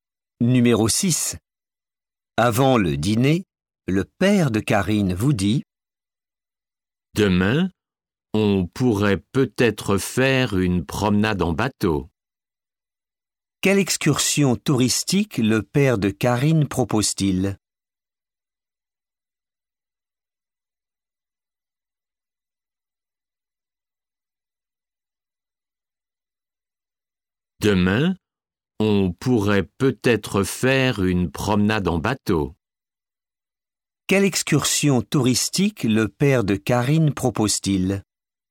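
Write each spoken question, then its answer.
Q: Quelle excursion touristique le père de Karine propose-t-il ?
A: Une promenade en bateau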